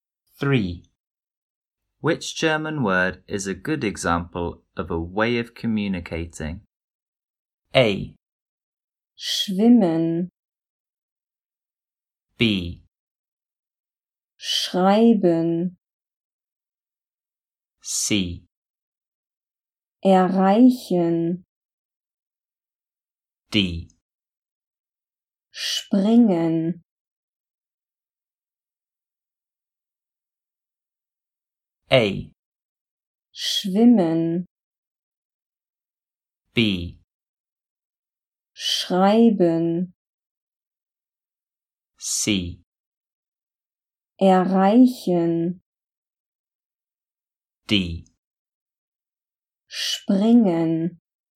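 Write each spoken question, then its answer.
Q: Which German word is a good example of a way of communicating?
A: B: Schreiben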